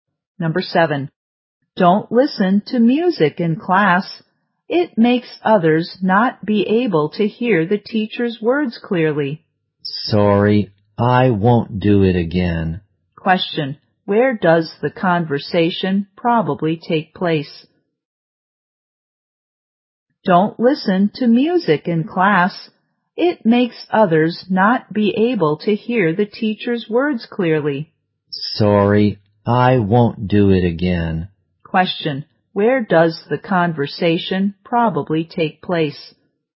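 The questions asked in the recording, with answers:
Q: Where does the conversation probably take place?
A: In a classroom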